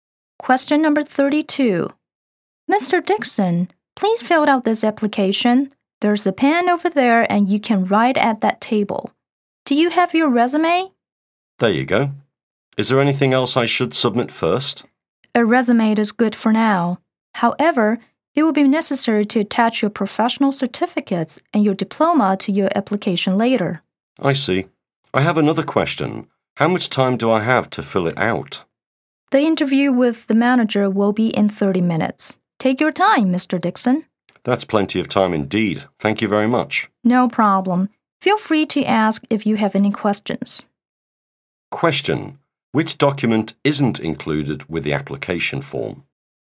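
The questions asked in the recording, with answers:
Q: Which document isn't included with the application form?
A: His professional certificates and diploma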